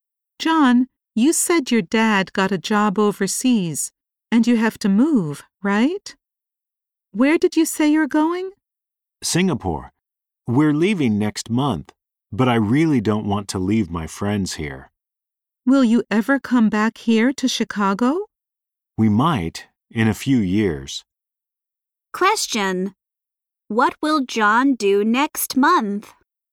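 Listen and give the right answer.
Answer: Move to Singapore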